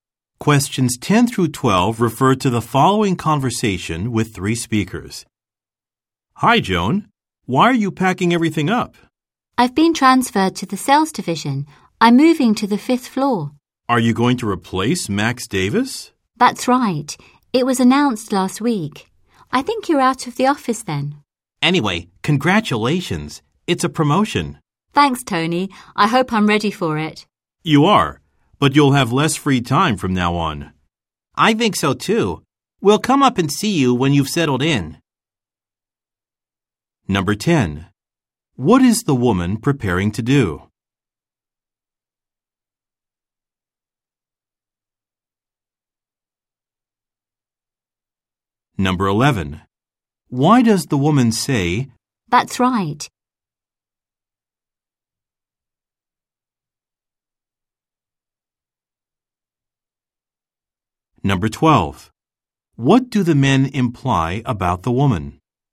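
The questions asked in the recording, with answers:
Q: What is the woman preparing to do?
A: Move to a new office on the fifth floor (sales division)

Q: Why does the woman say,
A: To confirm that she will replace Max Davis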